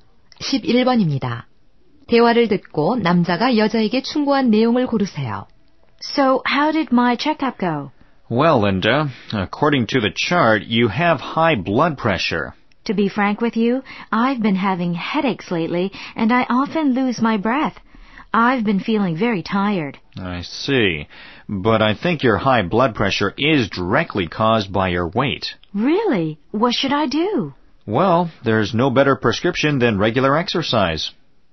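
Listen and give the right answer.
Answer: 규칙적인 운동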